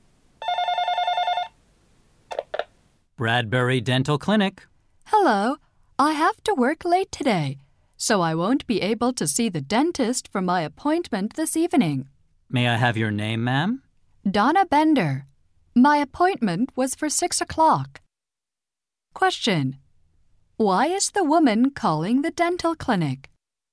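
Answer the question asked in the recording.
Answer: She can't come to her appointment this evening.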